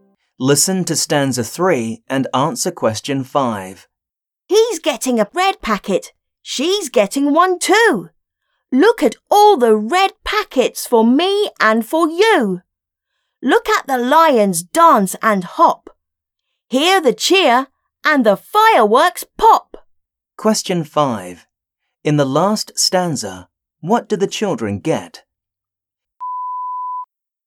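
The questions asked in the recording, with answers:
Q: In the last stanza, what do the children get?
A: Red packets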